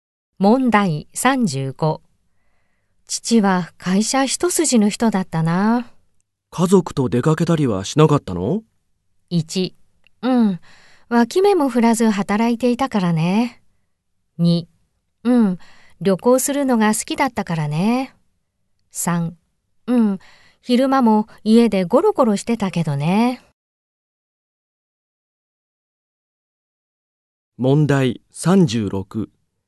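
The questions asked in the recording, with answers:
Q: 父は会社一筋の人だったな。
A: 1: うん、脇目も振らず働いていたからね。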